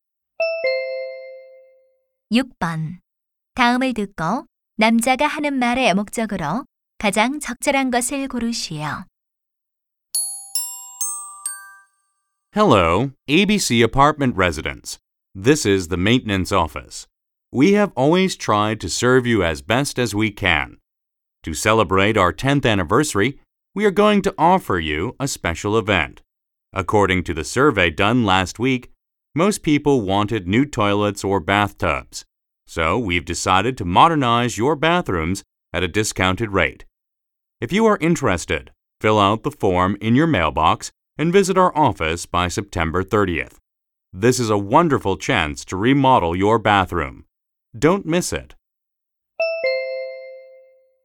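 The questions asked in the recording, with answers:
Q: 다음을 듣고 남자가 하는 말의 목적으로 가장 적절한 것을 고르시오.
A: 욕실을 할인된 가격에 리모델링해 주는 행사 안내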